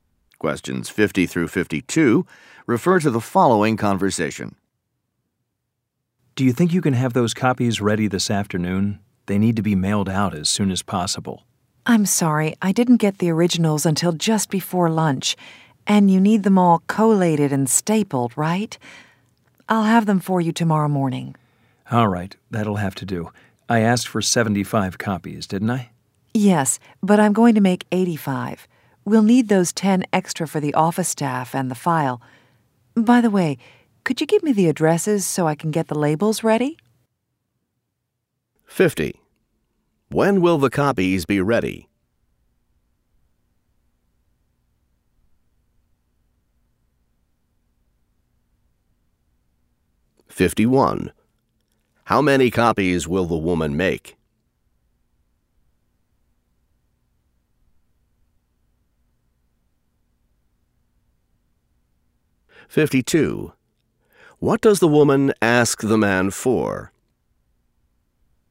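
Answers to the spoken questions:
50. Tomorrow morning
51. 85
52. The addresses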